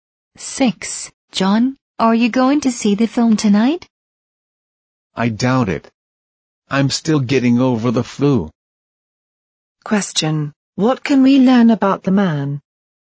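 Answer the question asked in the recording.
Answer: He probably won't see the film because he's still getting over the flu.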